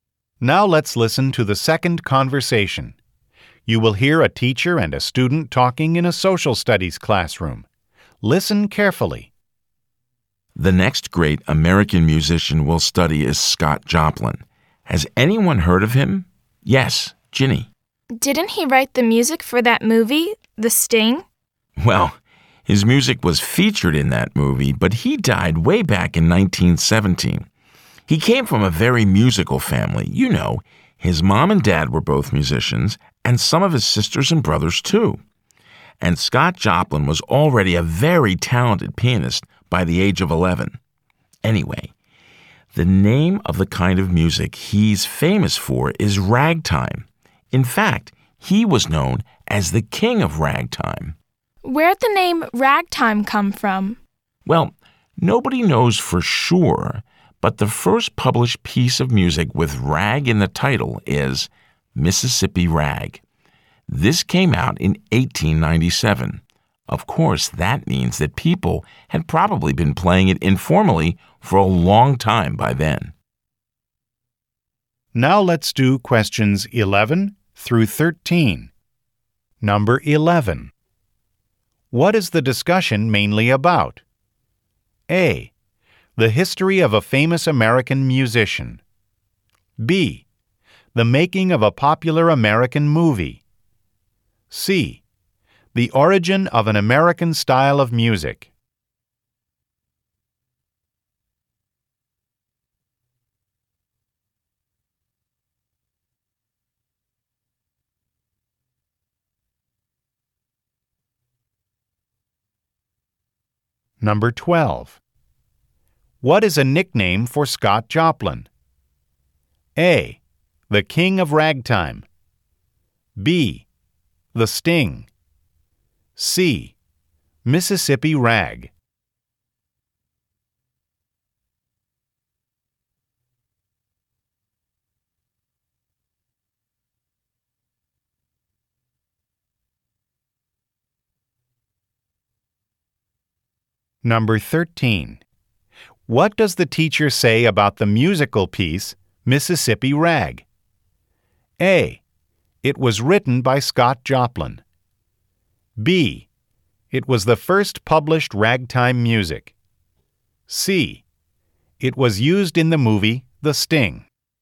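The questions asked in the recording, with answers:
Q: What is a nickname for Scott Joplin?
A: A: The King of Ragtime.

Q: What does the teacher say about the musical piece, Mississippi Rag?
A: B: It was the first published ragtime music.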